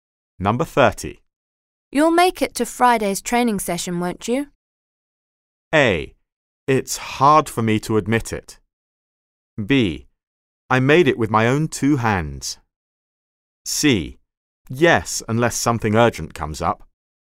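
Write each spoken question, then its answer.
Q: You'll make it to Friday's training session, won't you?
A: C: Yes, unless something urgent comes up.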